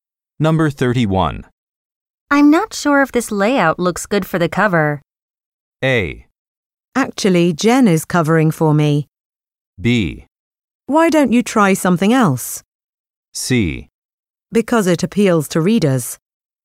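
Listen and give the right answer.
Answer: B: Why don't you try something else?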